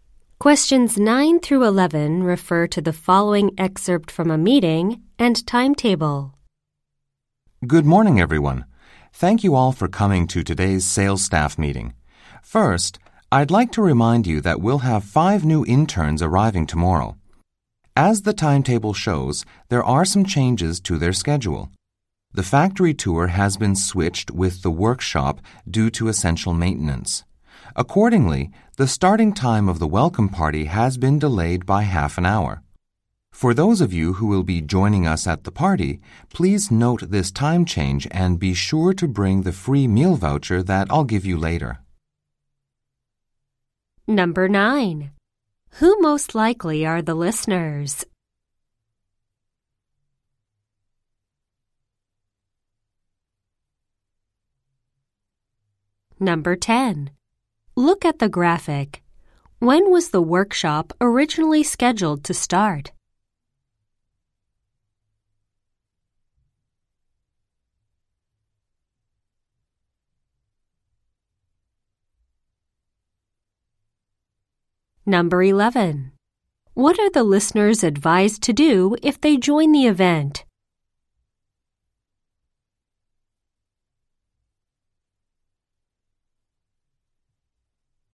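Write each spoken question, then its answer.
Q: Who most likely are the listeners?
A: Sales staff

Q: What are the listeners advised to do if they join the event?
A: Bring the free meal voucher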